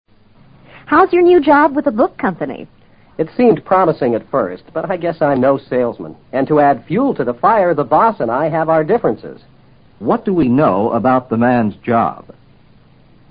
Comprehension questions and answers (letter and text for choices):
What do we know about the man's job?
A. He has a promising career.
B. He can't sell books.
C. He and his boss get along well.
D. He prefers to be a fireman.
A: B. He can't sell books.

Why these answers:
答案是依据I'm no salesman 的信息做出的推断。I'm no salesman意思是"我根本干不了推销员这一行,含义自然是他推销不掉书了。"promising career:很有发展前途的职业。他干不了推销,又与老板意见不和,不可能有promising career。C与对话内容相悖。D是以fire一词构置的干扰。 fireman:消防队员,与对话内容其实无关。to add fuel to the fire, 直译为火上浇油,这里的意思与to make the matter worse相同。